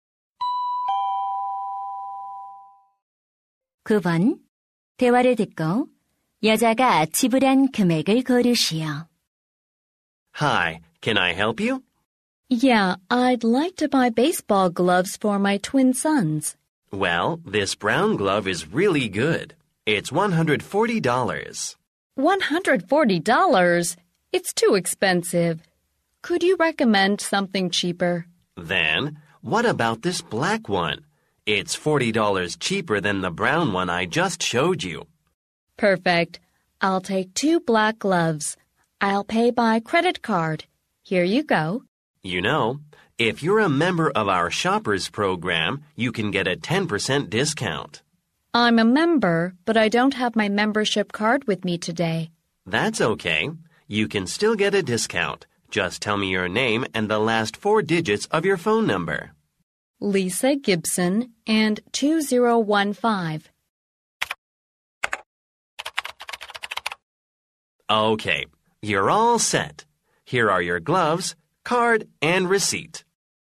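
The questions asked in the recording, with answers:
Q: 여자가 지불한 금액을 고르시오.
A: $180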